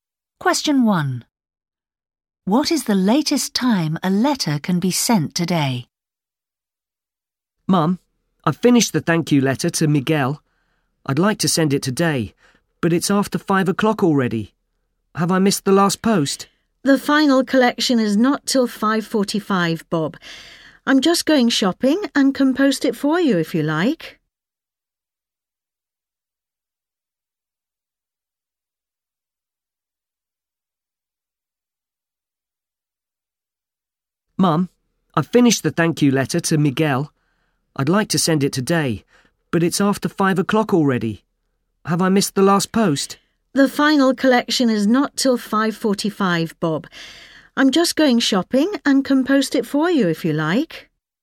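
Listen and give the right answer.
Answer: 5:45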